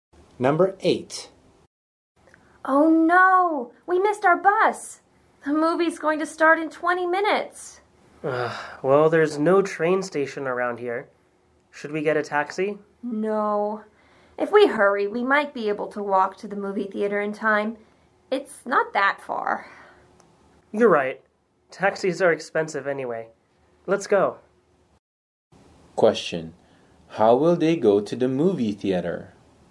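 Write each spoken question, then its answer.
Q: how will they go to the movie theater?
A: They will walk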